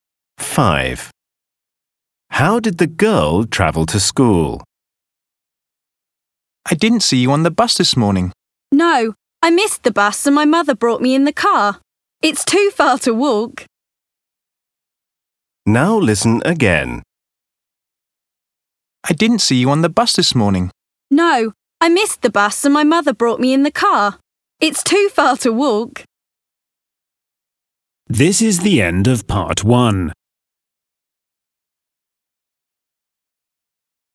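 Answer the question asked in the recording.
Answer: by car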